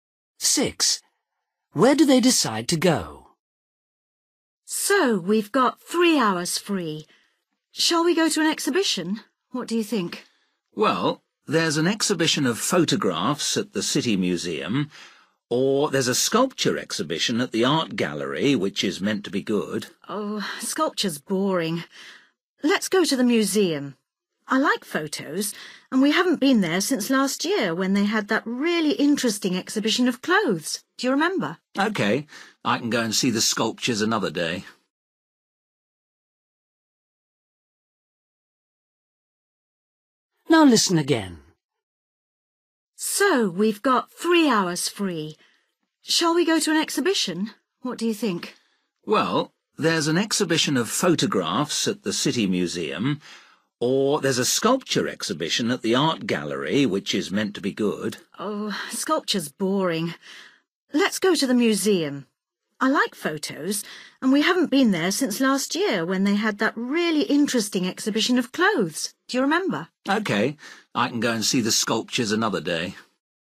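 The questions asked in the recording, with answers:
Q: Where do they decide to go?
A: The City Museum (photograph exhibition)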